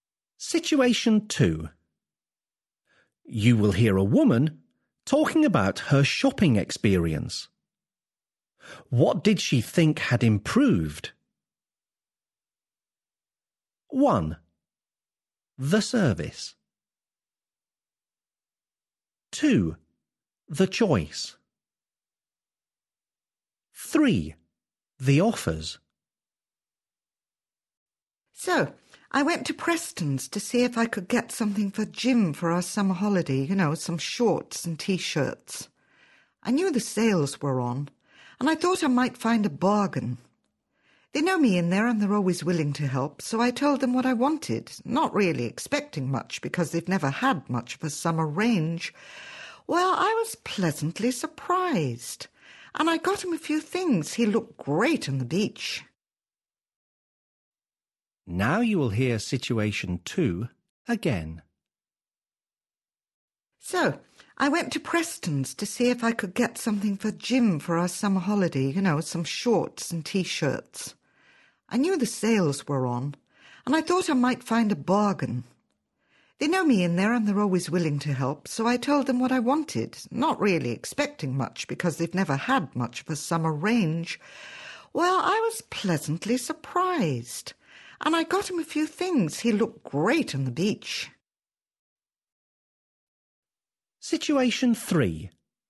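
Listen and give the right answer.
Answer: 2: The choice.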